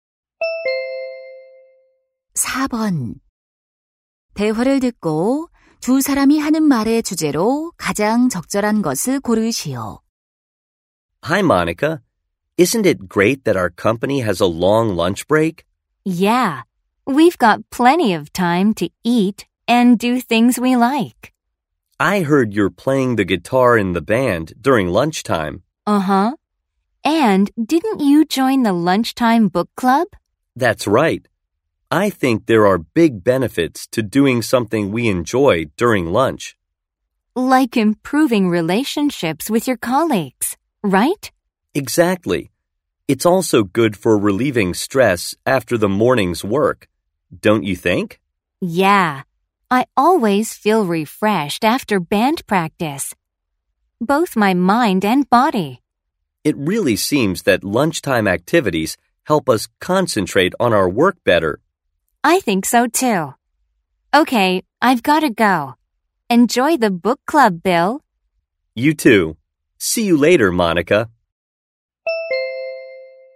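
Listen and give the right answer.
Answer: 점심시간 활동의 장점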